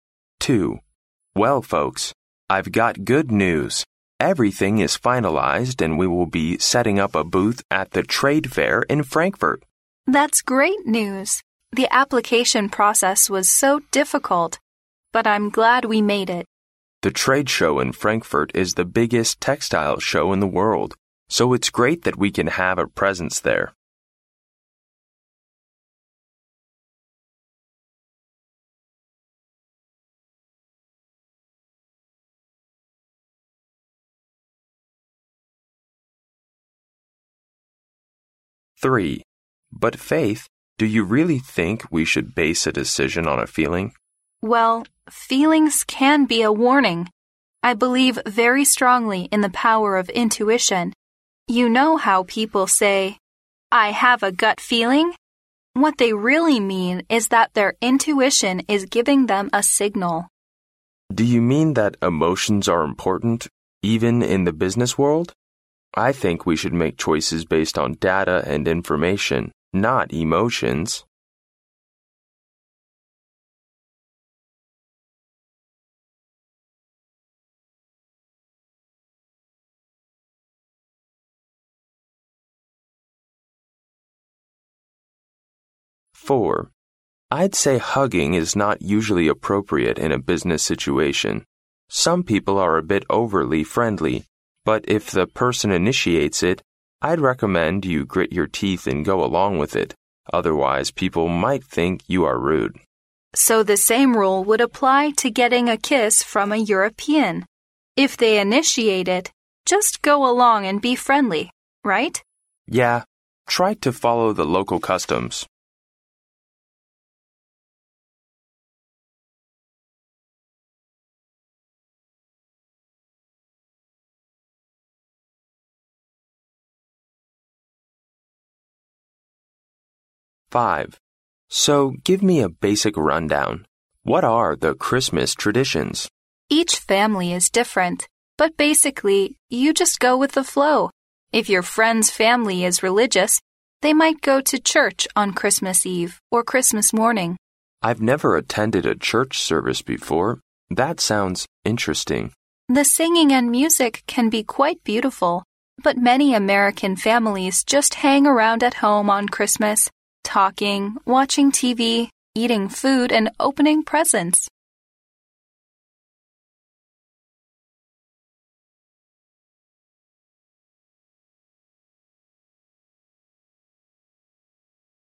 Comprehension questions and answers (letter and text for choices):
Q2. What are the speakers going to do according to the conversation?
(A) To start a new textile factory in Frankfurt.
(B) To set up a booth at the Frankfurt trade fair.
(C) To organize a grand world Expo in Germany.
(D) To sign a contract with a German company.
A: (B) To set up a booth at the Frankfurt trade fair.

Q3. What is the man's opinion about making decisions?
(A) Decisions should be made based on data.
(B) Decision making is a complicated process.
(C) Intuition serves as a signal in decision making.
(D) Gut feelings may help one make decisions.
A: (A) Decisions should be made based on data.

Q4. Which saying can describe the situations in the conversation?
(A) A friend in need is a friend indeed.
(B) Gentleness and kindness conquer at last.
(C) Two is company, but three is none.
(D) When in Rome, do as the Romans do.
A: (D) When in Rome, do as the Romans do.

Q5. How do Americans spend Christmas?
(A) Customs vary according to people's beliefs and habits.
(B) Friends get together at parties while children collect gifts.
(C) Religious families sing and play music on Christmas Eve.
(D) Many families go traveling during the Christmas season.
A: (A) Customs vary according to people's beliefs and habits.

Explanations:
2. 对话开头男士便宣布一切都筹备好了,"we'll be setting up a booth at the trade fair in Frankfurt!",之后的讨论便都围绕这个话题展开。由此可知,对话者将在法兰克福的贸易展销会上有一个摊位。因此B项正确。
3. 对话中在讨论做决定是要根据感情还是信息时,男士说"I think we should make choices based on data and information...not on emotions!"由此可知男士不同意以感情做决定的方式,他认为做决定应当以数据和信息为依据。因此A项正确。
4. 对话中男士说虽然拥抱在商务场合中不太合适,但如果有人这么做了,最好还是跟着做,最后还提到"Try to follow the local customs"。由此可知这个对话讨论的主要话题是"入乡随俗"。因此D项正确。
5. 对话中男士问起圣诞习俗时,女士回答说"每个家庭的习惯都不一样",比如宗教家庭会去教堂,而其他的家庭则有其他活动。由此可知,由于人们信仰和习惯不同,各家的圣诞习俗也不同。因此A项正确。

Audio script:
M: But Faith, do you really think we should base a decision on feelings?
W: Well, feelings can be a warning. I believe very strongly in the power of intuition. You know how people say, "I have a gut feeling?" What they really mean is that their intuition is giving them a signal.
M: Do you mean that emotions are important, even in the business world? I think we should make choices based on data and information...not on emotions!
M: I'd say hugging is not usually appropriate in a business situation. Some people are a bit overly friendly. But if the person initiates it, I'd recommend you grit your teeth and go along with it, otherwise people might think you are rude.
W: So the same rule would apply to getting a kiss from a European: if they initiate it, just go along and be friendly, right?
M: Yeah. Try to follow the local customs.
5 How do Americans spend Christmas?
M: So give me a basic rundown. What are the Christmas traditions?
W: Each family is different, but basically you just go with the flow. If your friend's family is religious they might go to church on Christmas Eve or Christmas morning.
M: I've never attended a church service before...that sounds interesting.
W: The sing and music can be very beautiful, but many American families just hang around at home on Christmas—talking, watching TV, eating food and open presents.